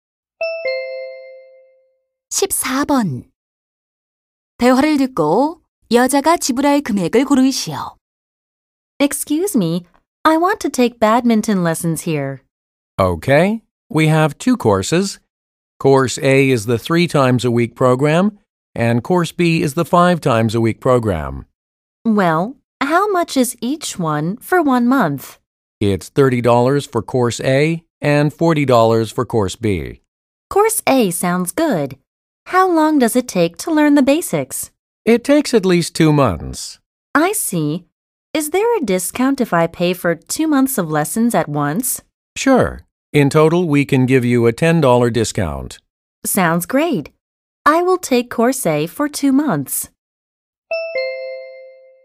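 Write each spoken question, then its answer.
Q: 대화를 듣고 여자가 지불할 금액을 고르시오.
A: $50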